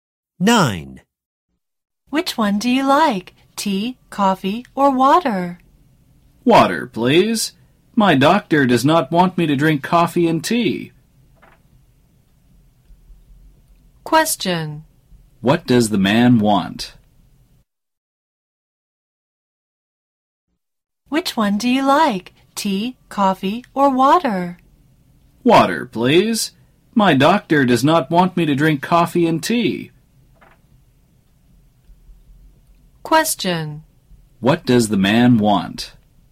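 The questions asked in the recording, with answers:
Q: What does the man want?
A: Water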